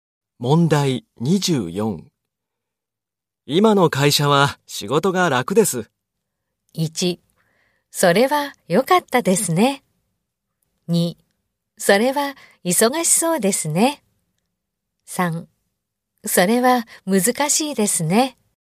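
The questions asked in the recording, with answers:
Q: 今の会社は仕事が楽です。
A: 1: それは良かったですね。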